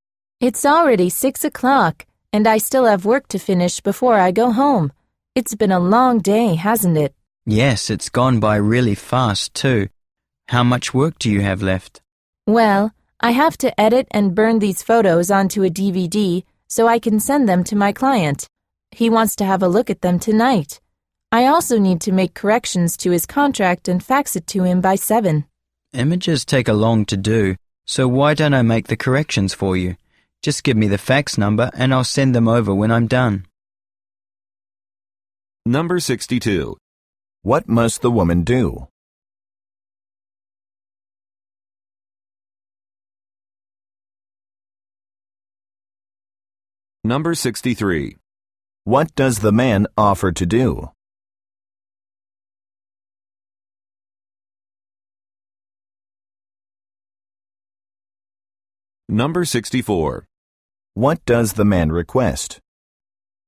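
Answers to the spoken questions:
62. Edit photos and burn them onto a DVD for her client, and correct his contract and fax it to him by 7
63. Make the corrections to the contract and fax it
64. The fax number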